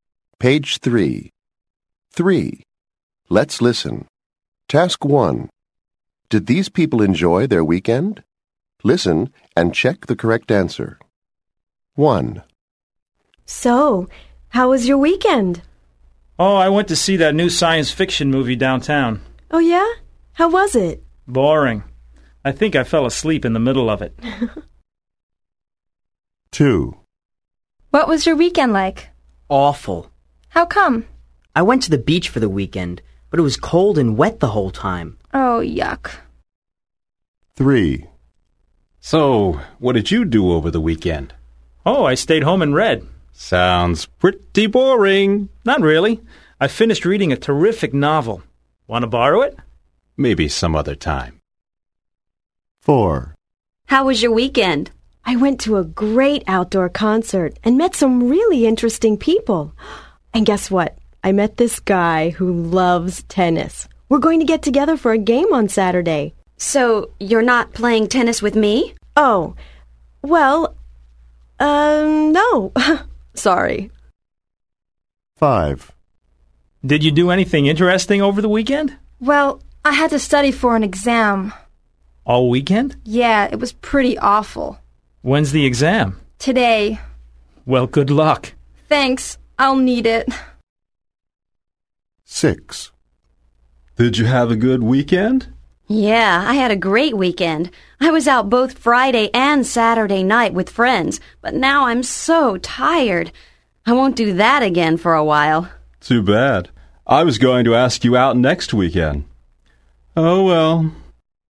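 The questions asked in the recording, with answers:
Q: Did these people enjoy their weekend?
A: No

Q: Did these people enjoy their weekend?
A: No

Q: Did these people enjoy their weekend?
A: Yes

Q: Did these people enjoy their weekend?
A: Yes

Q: Did these people enjoy their weekend?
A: No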